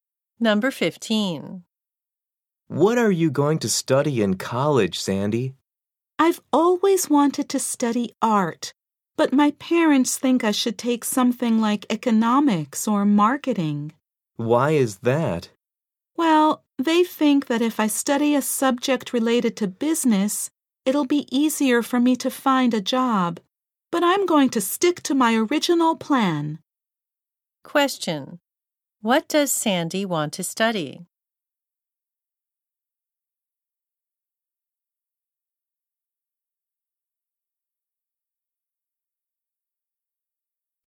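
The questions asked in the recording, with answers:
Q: What does Sandy want to study?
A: Art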